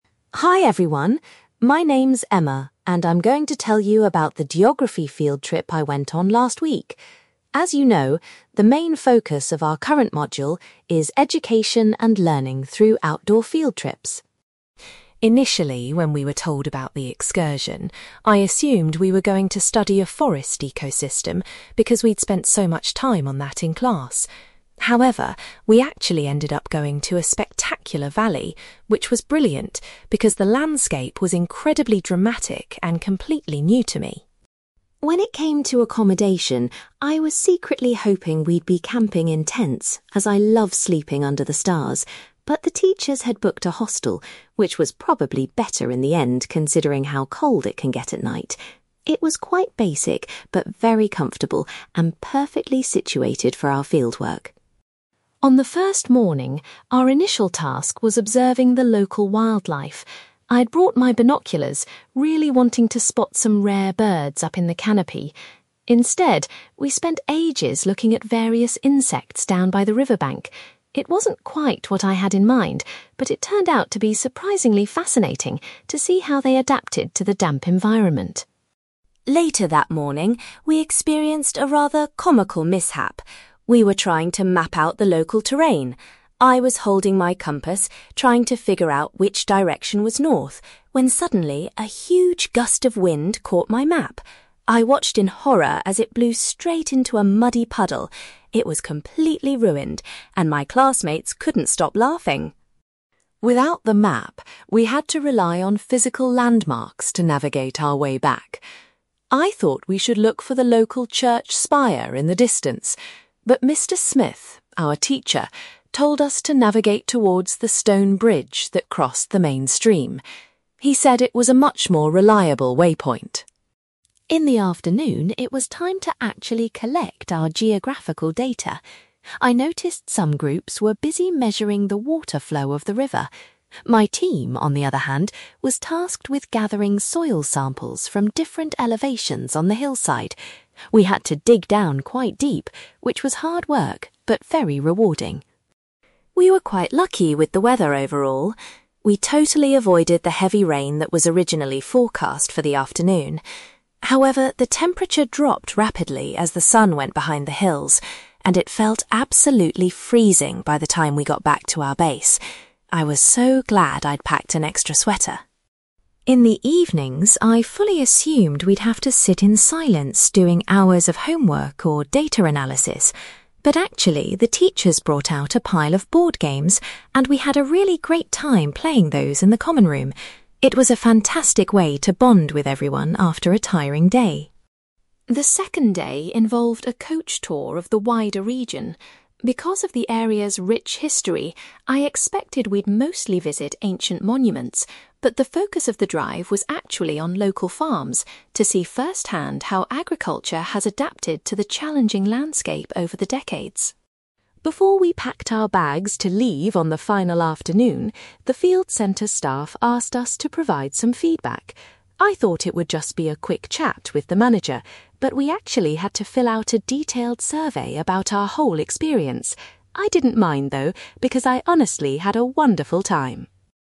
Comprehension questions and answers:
You will hear a girl called Emma giving a presentation about a geography field trip she recently went on. For questions 9-18, complete the sentences with a word or short phrase.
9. Emma's geography field trip took place in a beautiful (9)........................... rather than a forest.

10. Emma was surprised that her group stayed in a (10)........................... for the duration of the trip.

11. During her first wildlife observation, Emma spent most of her time studying (11)........................... by the water.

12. Emma was holding her compass when the wind blew her map into a (12)........................... , destroying it.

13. To find their way, Emma's teacher advised the group to head towards a (13)........................... near the stream.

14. Emma's group was given the responsibility of collecting (14)........................... during the afternoon data session.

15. Despite the lack of rain, Emma describes the weather later in the day as being (15)........................... .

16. Emma enjoyed playing (16)........................... with her classmates during the evening.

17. The main focus of the coach tour on the second day was looking at (17)........................... in the region.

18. Before departing, the students were required to complete a (18)........................... regarding their stay.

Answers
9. valley
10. hostel
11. insects
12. muddy puddle
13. stone bridge
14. soil samples
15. freezing
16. board games
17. farms
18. survey

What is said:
Emma: Hi everyone, my name's Emma, and I'm going to tell you about the geography field trip I went on last week. As you know, the main focus of our current module is education and learning through outdoor field trips.
Initially, when we were told about the excursion, I assumed we were going to study a forest ecosystem because we'd spent so much time on that in class. However, we actually ended up going to a spectacular valley, which was brilliant because the landscape was incredibly dramatic and completely new to me.
When it came to accommodation, I was secretly hoping we'd be camping in tents, as I love sleeping under the stars. But the teachers had booked a hostel, which was probably better in the end considering how cold it can get at night. It was quite basic, but very comfortable and perfectly situated for our fieldwork.
On the first morning, our initial task was observing the local wildlife. I'd brought my binoculars, really wanting to spot some rare birds up in the canopy. Instead, we spent ages looking at various insects down by the river bank. It wasn't quite what I had in mind, but it turned out to be surprisingly fascinating to see how they adapted to the damp environment.
Later that morning, we experienced a rather comical mishap. We were trying to map out the local terrain. I was holding my compass, trying to figure out which direction was north, when suddenly a huge gust of wind caught my map. I watched in horror as it blew straight into a muddy puddle! It was completely ruined, and my classmates couldn't stop laughing.
Without the map, we had to rely on physical landmarks to navigate our way back. I thought we should look for the local church spire in the distance, but Mr. Smith, our teacher, told us to navigate towards the stone bridge that crossed the main stream. He said it was a much more reliable waypoint.
In the afternoon, it was time to actually collect our geographical data. I noticed some groups were busy measuring the water flow of the river. My team, on the other hand, was tasked with gathering soil samples from different elevations on the hillside. We had to dig down quite deep, which was hard work but very rewarding.
We were quite lucky with the weather overall. We totally avoided the heavy rain that was originally forecast for the afternoon. However, the temperature dropped rapidly as the sun went behind the hills, and it felt absolutely freezing by the time we got back to our base. I was so glad I'd packed an extra sweater!
In the evenings, I fully assumed we'd have to sit in silence doing hours of homework or data analysis. But actually, the teachers brought out a pile of board games, and we had a really great time playing those in the common room. It was a fantastic way to bond with everyone after a tiring day.
The second day involved a coach tour of the wider region. Because of the area's rich history, I expected we'd mostly visit ancient monuments. But the focus of the drive was actually on local farms, to see firsthand how agriculture has adapted to the challenging landscape over the decades.
Before we packed our bags to leave on the final afternoon, the field centre staff asked us to provide some feedback. I thought it would just be a quick chat with the manager, but we actually had to fill out a detailed survey about our whole experience. I didn't mind, though, because I honestly had a wonderful time.

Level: B2